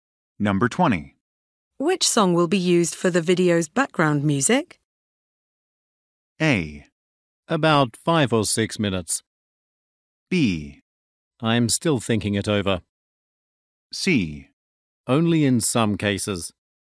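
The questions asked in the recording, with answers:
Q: Which song will be used for the video's background music?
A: B: I'm still thinking it over.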